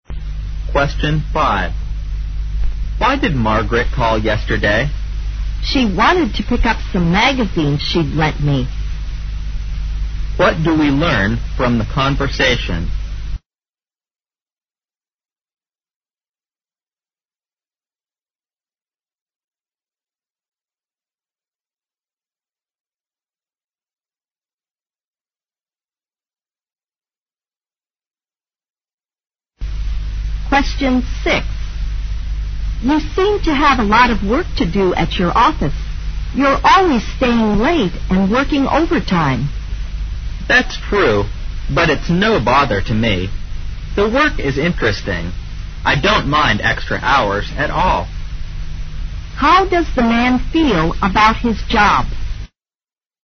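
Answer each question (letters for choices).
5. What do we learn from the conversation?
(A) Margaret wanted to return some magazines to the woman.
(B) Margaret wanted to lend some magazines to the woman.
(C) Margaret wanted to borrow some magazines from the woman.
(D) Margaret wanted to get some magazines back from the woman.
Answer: D

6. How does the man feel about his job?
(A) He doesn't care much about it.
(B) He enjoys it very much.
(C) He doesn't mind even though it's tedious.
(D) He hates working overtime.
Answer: B

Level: 四级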